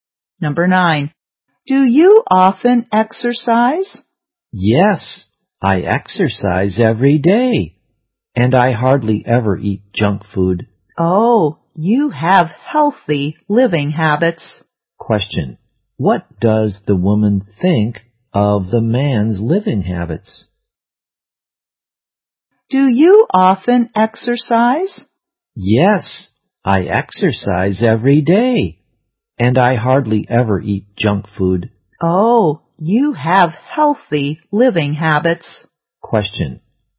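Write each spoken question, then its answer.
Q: Question. What does the woman think of the man's living habits?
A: Healthy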